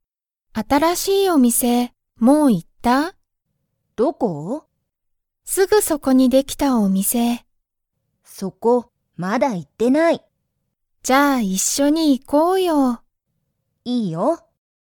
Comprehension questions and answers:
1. 新(あたら)しいお店みせは、____できた。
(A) 一緒(いっしょ)に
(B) すぐそこに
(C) まだ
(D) 特(とく)に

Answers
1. B

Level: Level 1

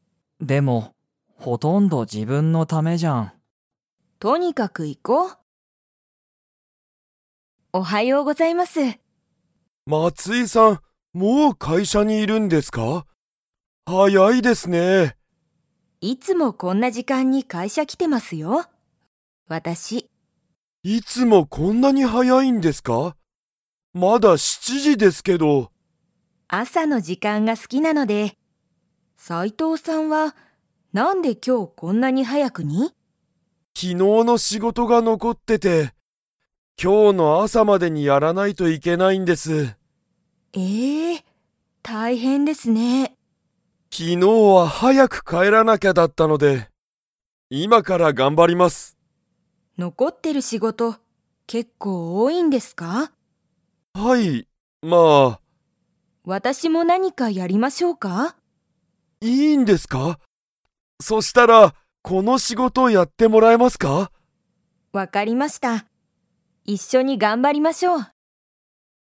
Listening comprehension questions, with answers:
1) 松井まついさんは、いつも早はやく会社かいしゃに来きていますか?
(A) はい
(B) いいえ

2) 斎藤さいとうさんは、____早はやく帰かえらなきゃいけなかった。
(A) いつも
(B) 昨日きのう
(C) 朝あさ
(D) 結構けっこう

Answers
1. A
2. B

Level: Level 2

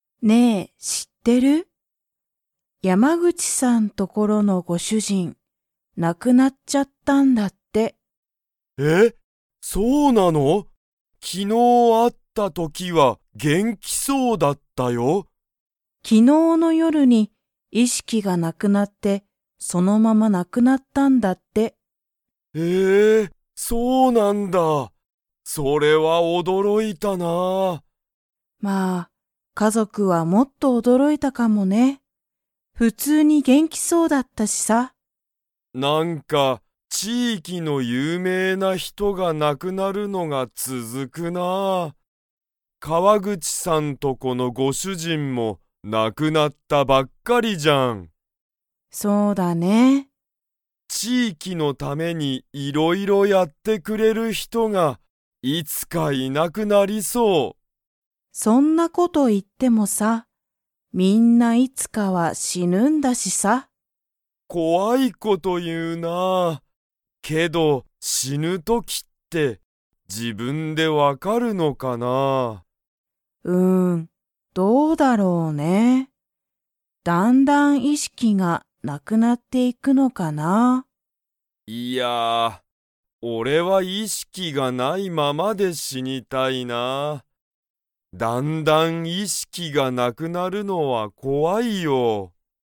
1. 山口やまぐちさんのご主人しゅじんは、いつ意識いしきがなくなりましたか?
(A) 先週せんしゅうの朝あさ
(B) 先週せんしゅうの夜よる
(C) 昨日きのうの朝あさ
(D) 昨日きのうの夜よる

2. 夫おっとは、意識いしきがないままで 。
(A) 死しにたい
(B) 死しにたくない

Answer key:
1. D
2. A

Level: Level 3

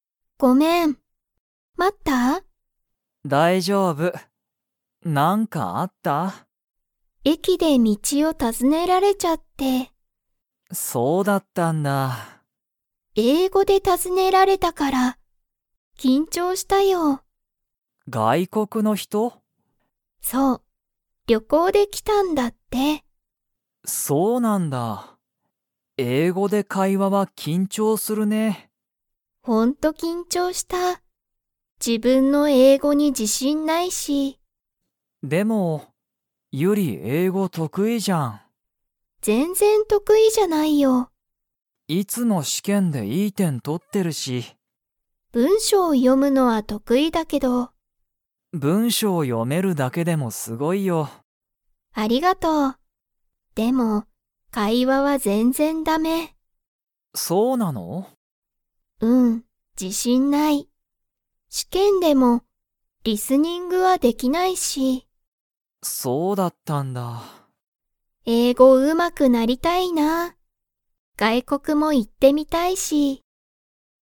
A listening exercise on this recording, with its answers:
Comprehension Quiz (Skip if you don't understand the conversation yet)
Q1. ユリは、駅えきで誰だれに道みちを尋たずねられましたか?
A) 日本人にほんじん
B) 外国がいこくの人ひと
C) 友達ともだち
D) お母かあさん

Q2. ユリは、英語えいごの会話かいわに自信じしんが 。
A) ある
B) ない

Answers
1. B
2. B

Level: Level 4

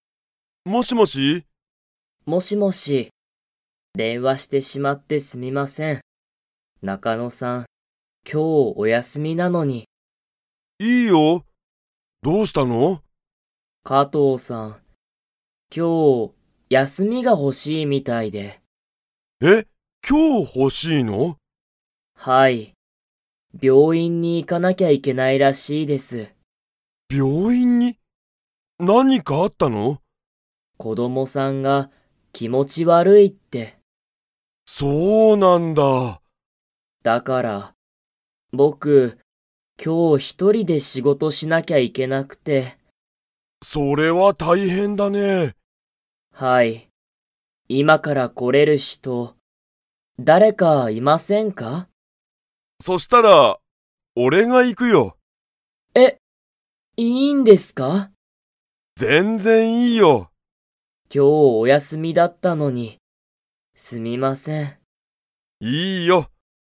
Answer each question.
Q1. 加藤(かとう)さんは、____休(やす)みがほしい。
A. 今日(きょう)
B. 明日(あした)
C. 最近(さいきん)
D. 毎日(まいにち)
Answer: A

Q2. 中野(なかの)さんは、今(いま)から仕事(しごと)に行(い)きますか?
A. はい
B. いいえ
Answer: A

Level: Level 2

